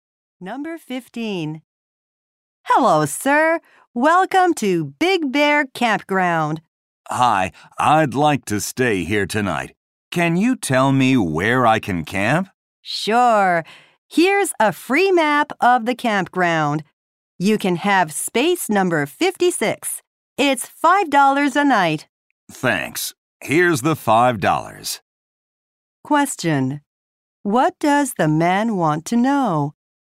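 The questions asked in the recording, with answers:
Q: What does the man want to know?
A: Where he can camp.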